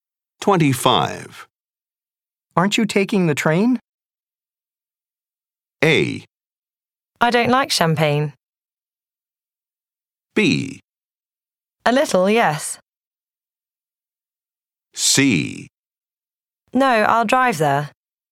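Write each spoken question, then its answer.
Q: Aren't you taking the train?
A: C: No, I'll drive there.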